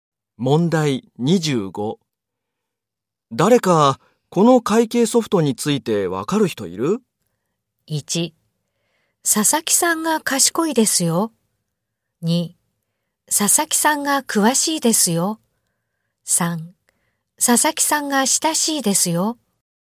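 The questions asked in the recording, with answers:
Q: 誰かこの会計ソフトについてわかる人いる?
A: 2: 佐々木さんが詳しいですよ。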